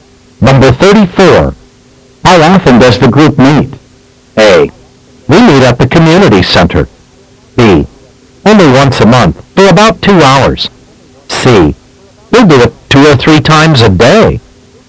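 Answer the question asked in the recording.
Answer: B: Only once a month, for about 2 hours.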